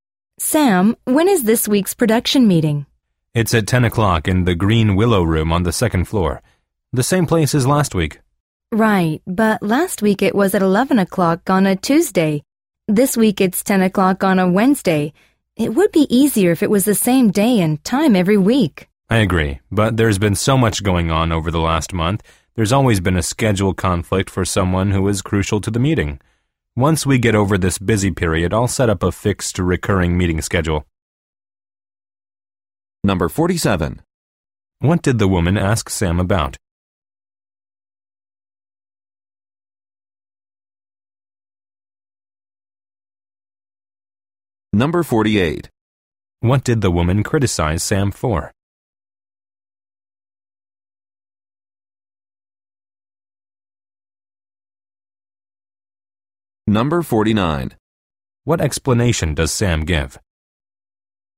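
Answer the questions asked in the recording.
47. When this week's production meeting is
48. The meeting is not held on the same day and time every week
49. It has been very busy, so there have been schedule conflicts for key people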